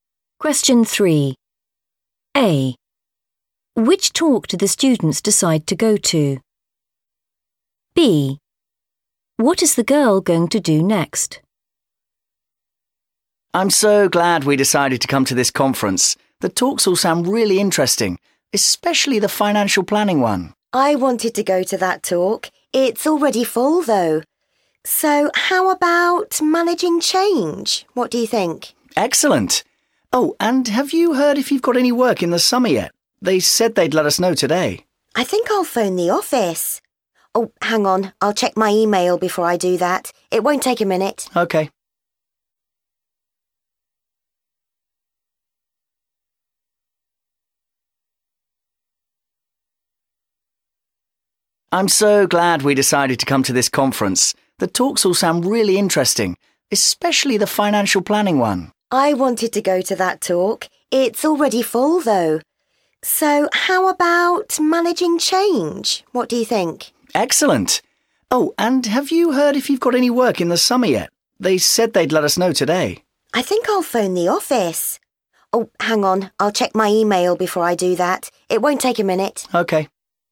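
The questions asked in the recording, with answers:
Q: Which talk do the students decide to go to?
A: managing change

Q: What is the girl going to do next?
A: check her email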